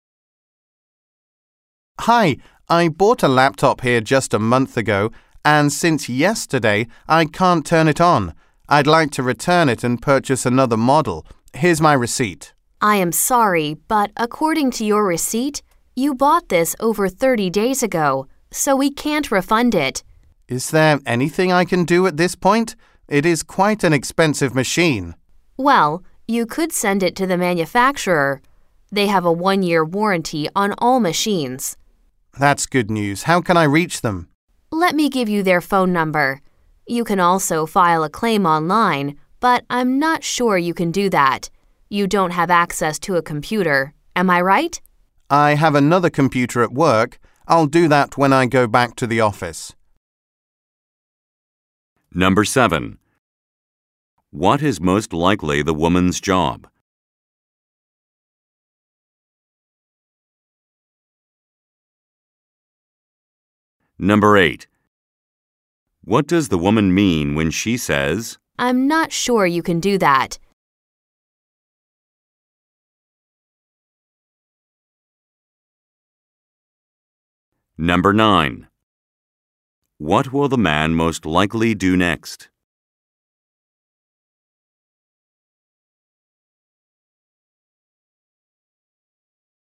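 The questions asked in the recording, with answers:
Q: What is most likely the woman's job?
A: A store sales clerk (electronics store employee)

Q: What does the woman mean when she says,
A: She thinks he may not have a computer to use, since his laptop is broken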